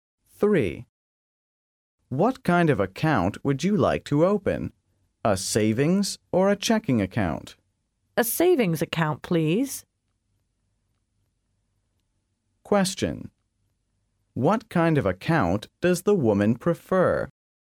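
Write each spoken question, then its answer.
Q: What kind of account does the woman prefer?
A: A savings account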